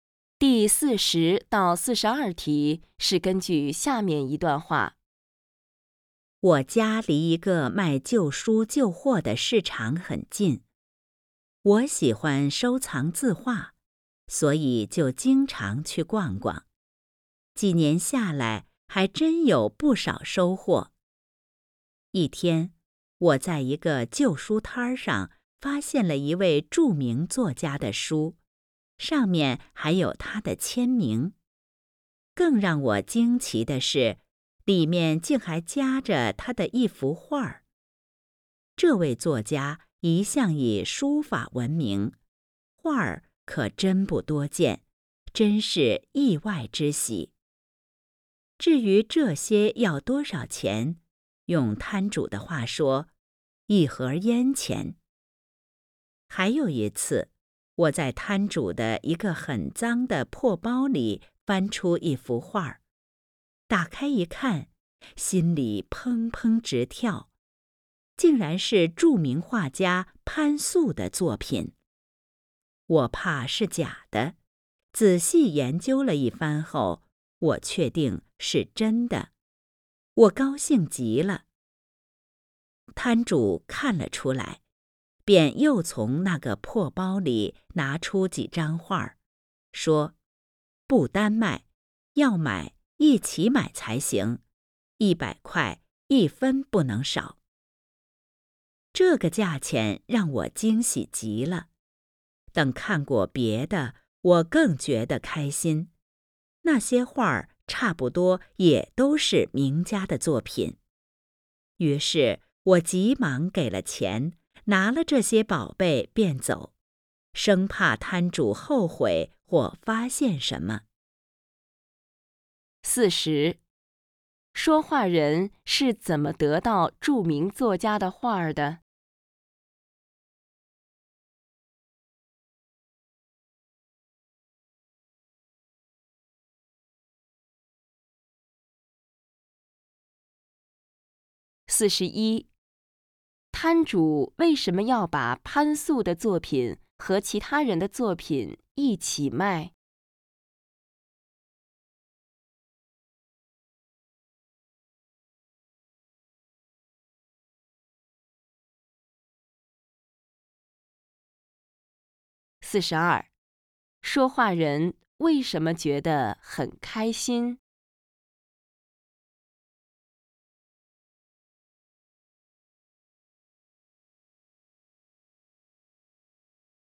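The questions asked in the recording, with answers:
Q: 说话人是怎么得到著名作家的画儿的?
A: 在旧书摊上买的书里夹着,只花了一盒烟钱

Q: 说话人为什么觉得很开心?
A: 那些画差不多都是名家作品,价钱又很便宜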